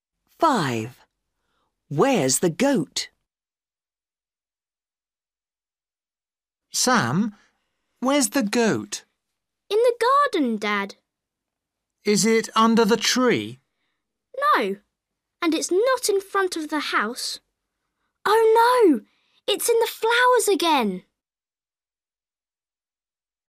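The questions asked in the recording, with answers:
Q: Where's the goat?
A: In the flowers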